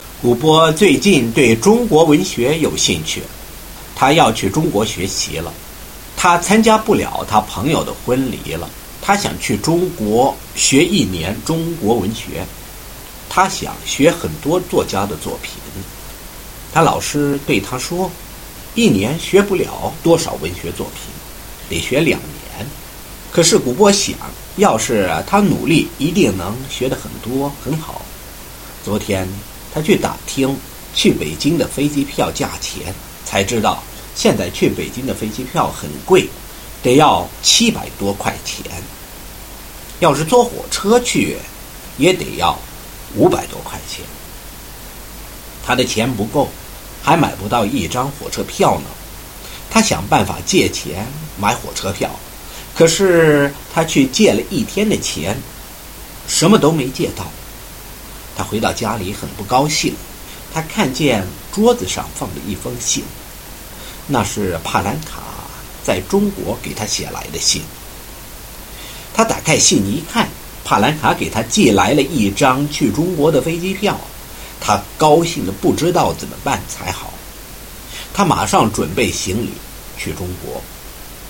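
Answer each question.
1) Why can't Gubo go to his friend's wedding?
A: Because he is going to China to study.

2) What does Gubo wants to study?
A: Chinese literature

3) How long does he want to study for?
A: One year

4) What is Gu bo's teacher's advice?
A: One year is not enough; he should study for two years.

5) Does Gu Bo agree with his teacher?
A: No, he thinks if he works hard he can learn a lot in one year.

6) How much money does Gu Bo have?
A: Not enough even for a train ticket (less than 500 yuan).

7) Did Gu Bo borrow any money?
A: No, he couldn't borrow any.

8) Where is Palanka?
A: In China

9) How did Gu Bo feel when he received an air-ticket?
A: So happy he didn't know what to do.

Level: First year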